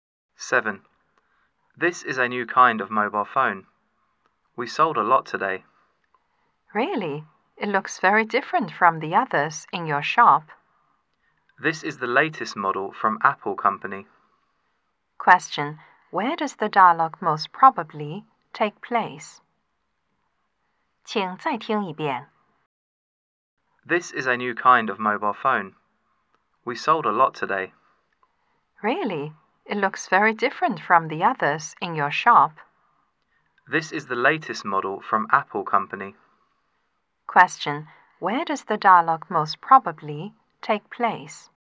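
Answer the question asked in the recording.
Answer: In a mobile phone shop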